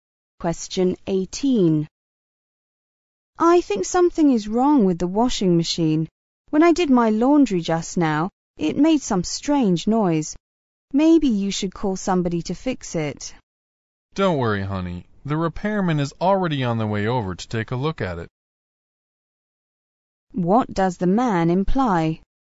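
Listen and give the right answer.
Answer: The repairman is coming to fix the washing machine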